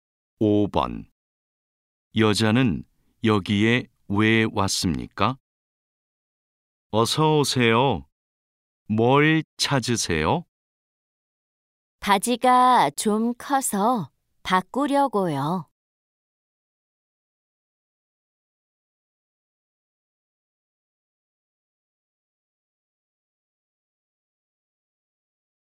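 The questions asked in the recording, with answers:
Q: 여자는 여기에 왜 왔습니까?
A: 바지가 커서 바꾸려고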